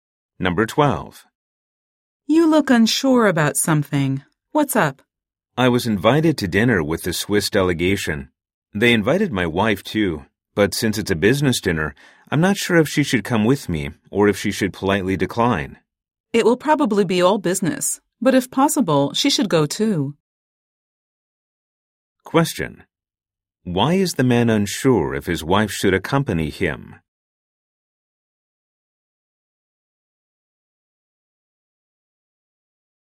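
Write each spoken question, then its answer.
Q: Why is the man unsure if his wife should accompany him?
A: Because it is a business dinner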